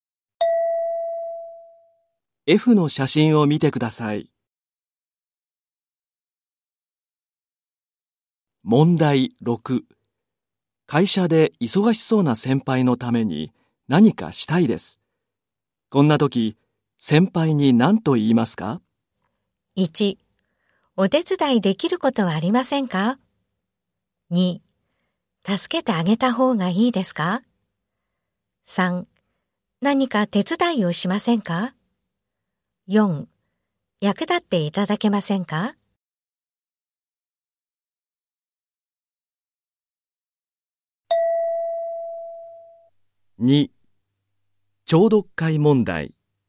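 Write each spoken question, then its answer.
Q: 会社で忙しそうな先輩のために何かしたいです。こんな時、先輩に何と言いますか?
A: 1: お手伝いできることはありませんか?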